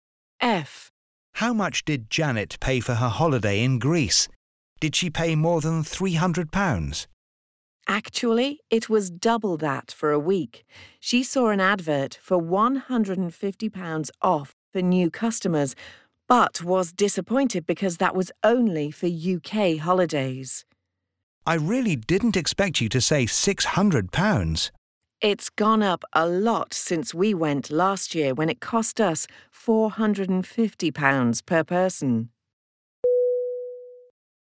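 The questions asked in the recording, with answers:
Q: How much did Janet pay for her holiday in Greece?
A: £600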